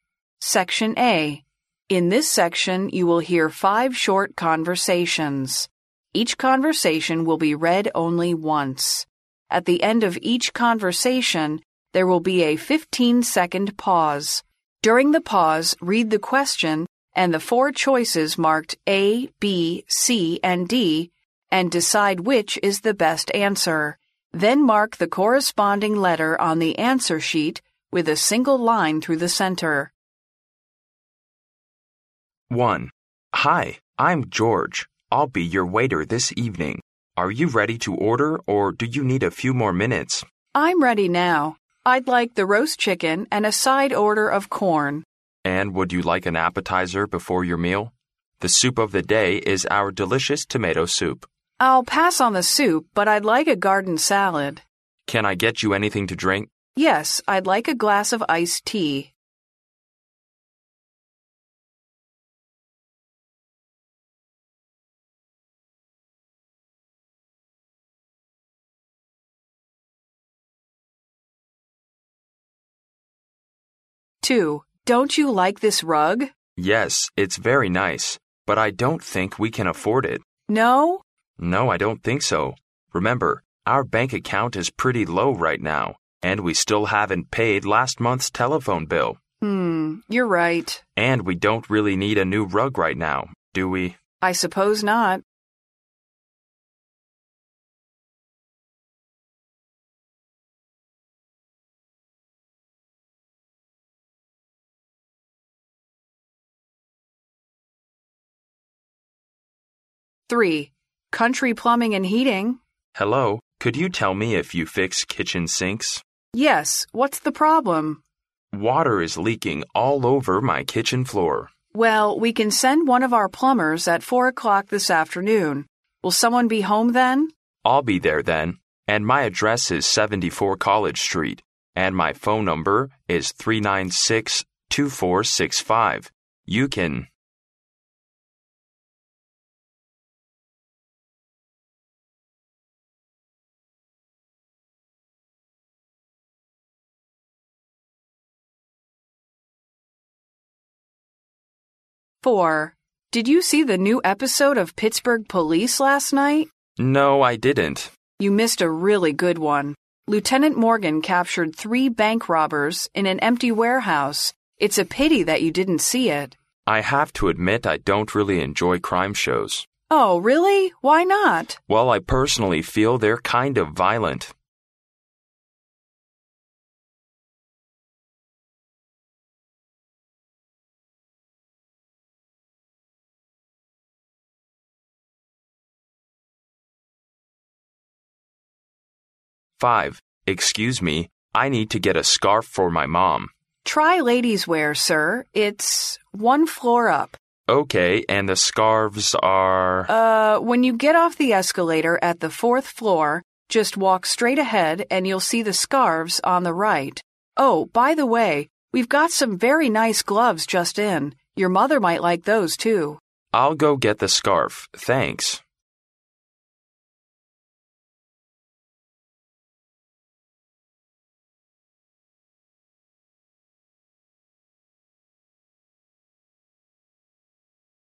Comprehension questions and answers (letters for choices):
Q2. What does the man think of the rug recommended?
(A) It's poor in quality.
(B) It looks too showy.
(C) It costs too much.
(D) It's difficult to clean.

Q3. What's the man's problem?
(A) There is a hole in his kitchen roof.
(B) His kitchen sink is leaking.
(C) He can't open his kitchen door.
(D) He is feeling sick in the kitchen.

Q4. What does the man think of the episode?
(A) Exciting.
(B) Enjoyable.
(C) Violent.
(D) Boring.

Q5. What will the man most probably do next?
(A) Walk straight ahead to the Ladies' Wear Section.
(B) Take the escalator up to the 4th floor.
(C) Take a look at the gloves that have just come in.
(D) Call his mom to ask for her opinion.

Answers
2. C
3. B
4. C
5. B

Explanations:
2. 对话第一句中,女人问男人是不是不喜欢这个毯子,男人回答毯子很好,只是他们负担不起。因此选择C项。
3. 根据前面的对话可知,男人打电话的目的是想找人帮忙修理厨房水槽;女人进一步询问时,男人回答水槽里的水漏得厨房地板上到处都是。因此选择B项。
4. 对话最后一句中,男人说他个人认为这些电视情节有些暴力,因此选择C项。
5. 根据对话可知,女人告诉男人围巾在女装区,还需要坐电梯上一层到第四层。因此选择B项。